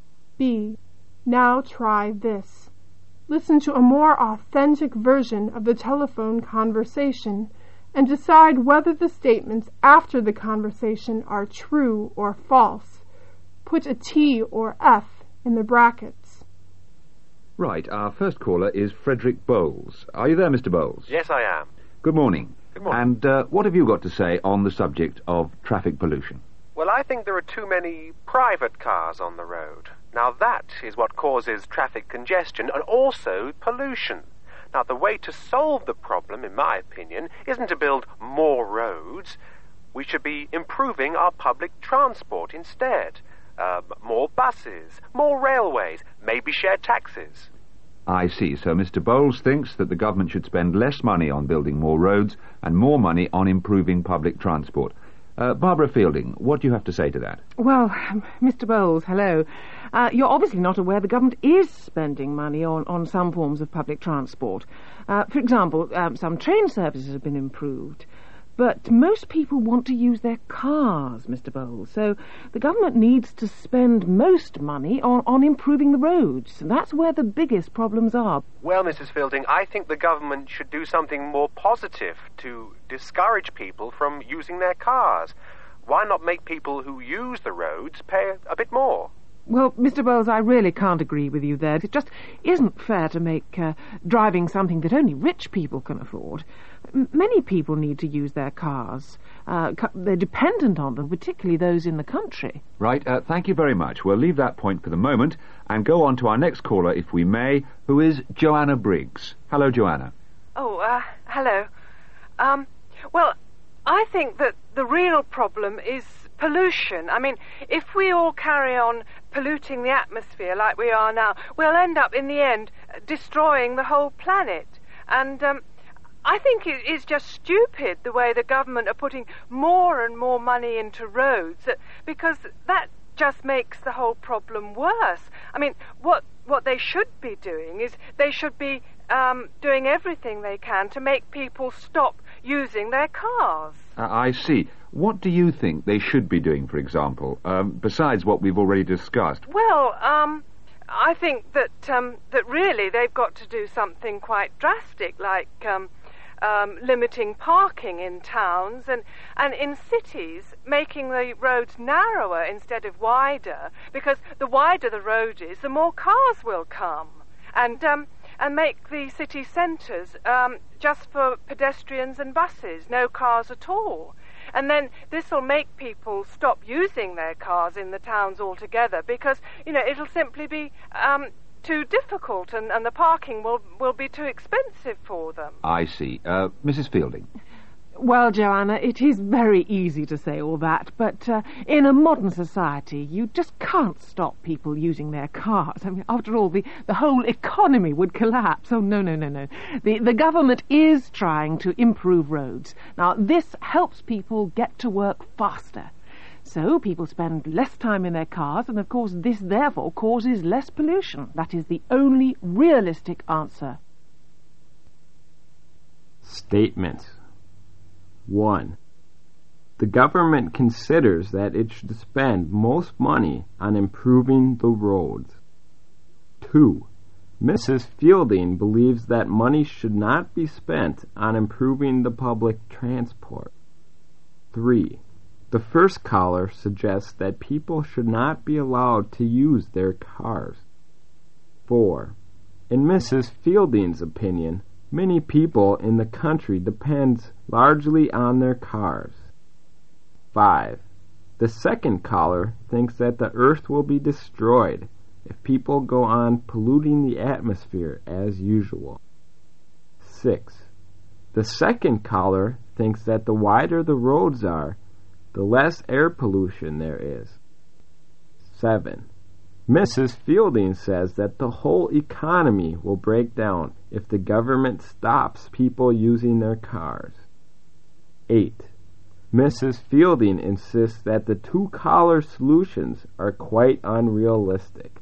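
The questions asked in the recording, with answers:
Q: The government considers that it should spend most money on improving the roads.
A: True

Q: Mrs. Fielding believes that money should not be spent on improving the public transport.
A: False

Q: The first caller suggests that people should not be allowed to use their cars.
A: False

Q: In Mrs. Fielding's opinion, many people in the country depend largely on their cars.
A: True

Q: The second caller thinks that the earth will be destroyed if people go on polluting the atmosphere as usual.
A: True

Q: The second caller thinks that the wider the roads are, the less air pollution there is.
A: False

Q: Mrs. Fielding says that the whole economy will break down if the government stops people using their cars.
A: True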